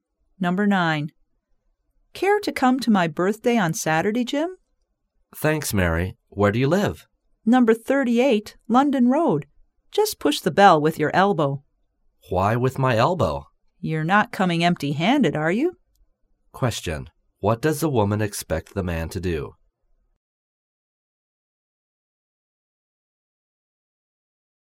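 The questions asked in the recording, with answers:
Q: What does the woman expect the man to do?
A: Bring a present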